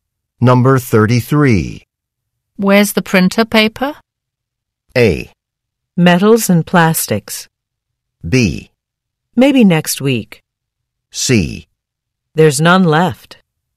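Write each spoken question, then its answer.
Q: Where's the printer paper?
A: C: There's none left.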